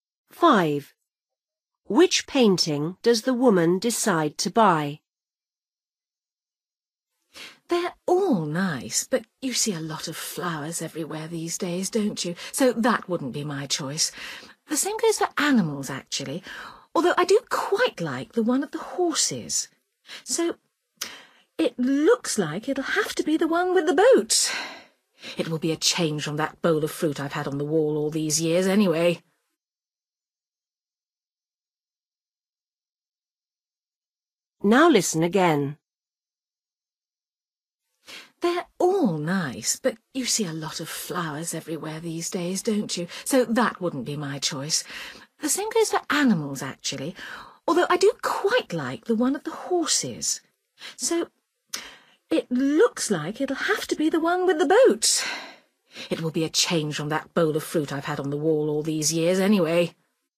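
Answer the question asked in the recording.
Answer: the one with the boat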